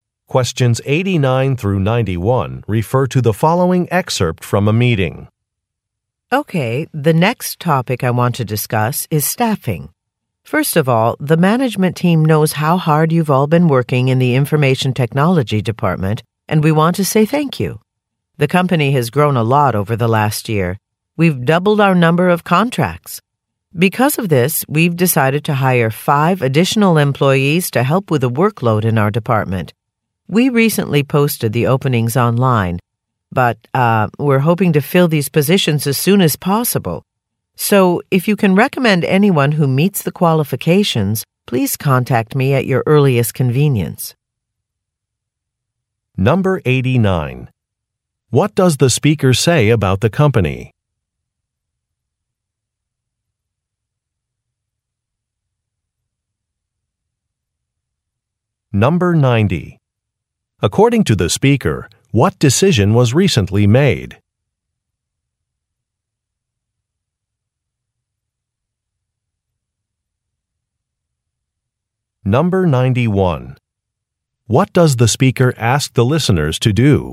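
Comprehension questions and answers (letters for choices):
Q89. What does the speaker say about the company?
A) It acquired additional contracts.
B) It launched a product.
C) It appointed a new president.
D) It started a charity fund.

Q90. According to the speaker, what decision was recently made?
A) To move a company overseas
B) To remodel an office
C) To upgrade technology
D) To hire more staff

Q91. What does the speaker ask the listeners to do?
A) Attend a workshop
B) Make recommendations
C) Sign a contract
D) Submit a list of questions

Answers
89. A
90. D
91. B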